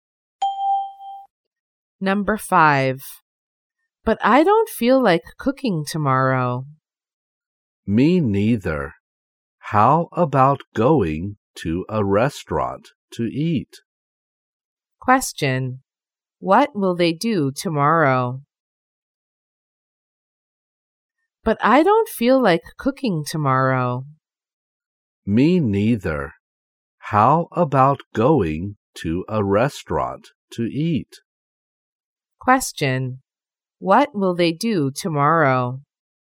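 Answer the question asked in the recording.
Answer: Go to a restaurant to eat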